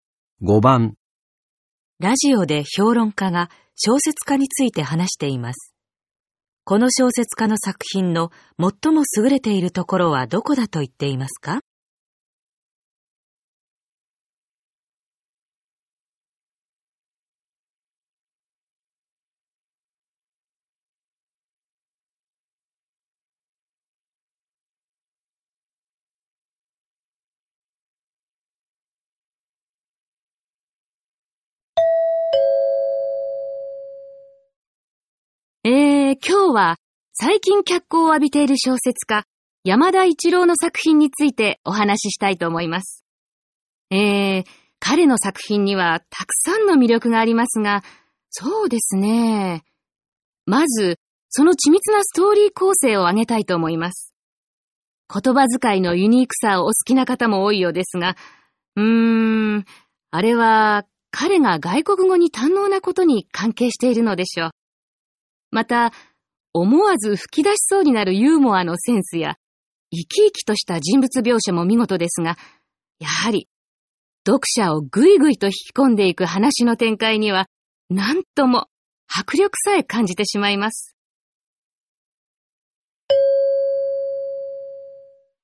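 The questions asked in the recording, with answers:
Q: この小説家の作品の最も優れているところはどこだと言っていますか?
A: 読者を引き込んでいく話の展開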